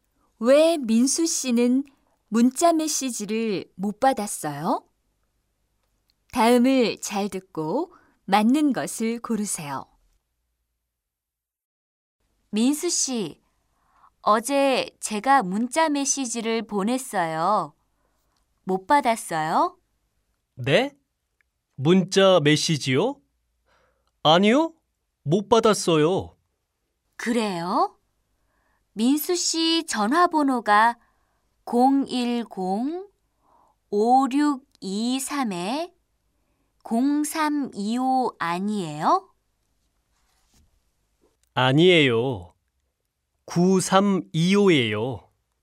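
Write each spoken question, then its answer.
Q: 왜 민수 씨는 문자 메시지를 못 받았어요?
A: 전화번호를 잘못 알고 보냈어요 (0325가 아니라 9325예요)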